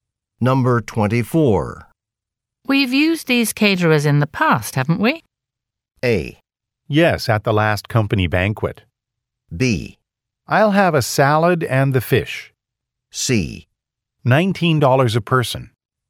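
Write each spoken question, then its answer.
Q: We've used these caterers in the past, haven't we?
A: A: Yes, at the last company banquet.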